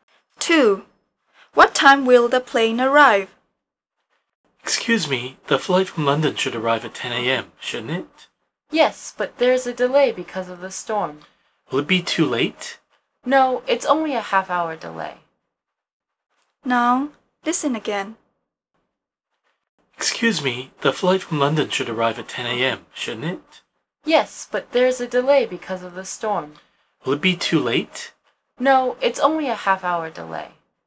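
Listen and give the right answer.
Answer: 10:30 a.m.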